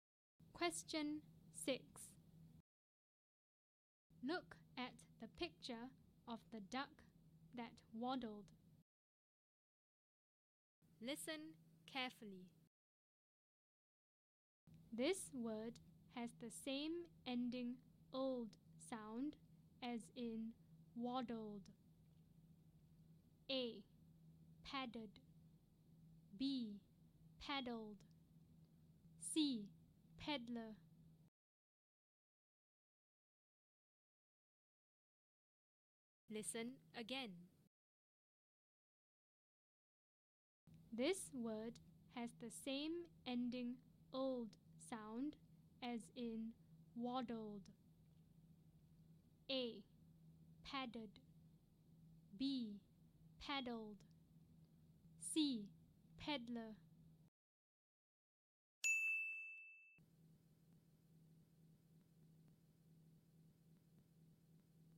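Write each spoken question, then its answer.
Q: This word has the same ending old sound as in waddled.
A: B: Paddled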